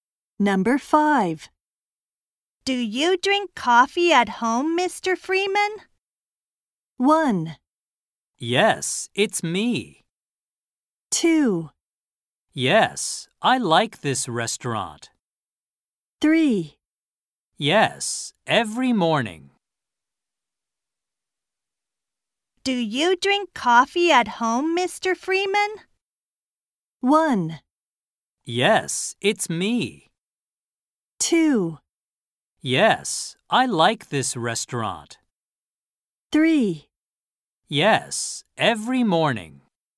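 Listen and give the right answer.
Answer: 3: Yes, every morning.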